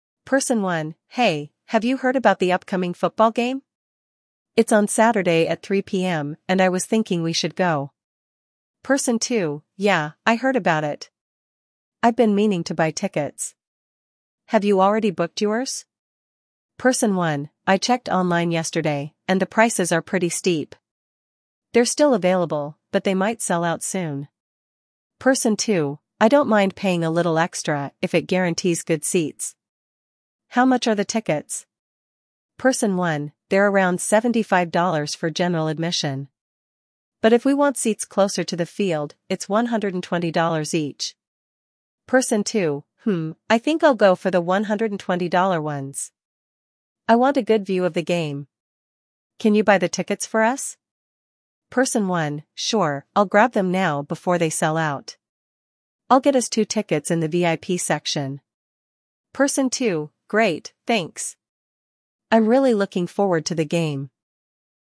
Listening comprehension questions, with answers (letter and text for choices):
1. What event are the two people discussing?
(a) A music concert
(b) A football game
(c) A theater show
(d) A basketball game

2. What is Person 1's concern about the tickets?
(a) The tickets are too expensive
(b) The tickets might sell out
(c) The match time is inconvenient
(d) The venue is too far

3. What are the two price options for the tickets?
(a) $50 for general admission, $100 for VIP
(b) $75 for general admission, $120 for closer seats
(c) $60 for general admission, $150 for VIP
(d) $80 for general admission, $130 for front row seats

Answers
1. (b) A football game
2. (b) The tickets might sell out
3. (b) $75 for general admission, $120 for closer seats

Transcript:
Person 1: "Hey, have you heard about the upcoming football game? It's on Saturday at 3:00 PM, and I was thinking we should go."
Person 2: "Yeah, I heard about it! I've been meaning to buy tickets. Have you already booked yours?"
Person 1: "I checked online yesterday, and the prices are pretty steep. They're still available, but they might sell out soon."
Person 2: "I don't mind paying a little extra if it guarantees good seats. How much are the tickets?"
Person 1: "They're around $75 for general admission. But if we want seats closer to the field, it's $120 each."
Person 2: "Hmm, I think I'll go for the $120 ones. I want a good view of the game. Can you buy the tickets for us?"
Person 1: "Sure, I'll grab them now before they sell out. I'll get us two tickets in the VIP section."
Person 2: "Great, thanks! I'm really looking forward to the game."